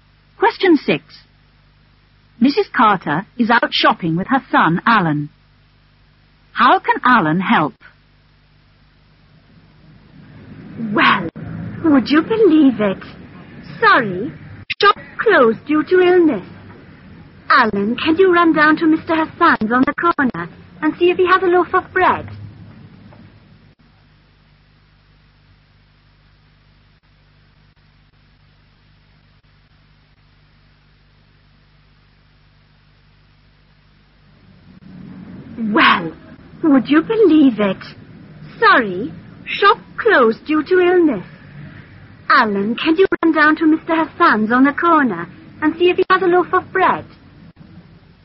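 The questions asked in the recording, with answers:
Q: How can Alan help?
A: By going to Mr Hassan's shop on the corner to see if he has a loaf of bread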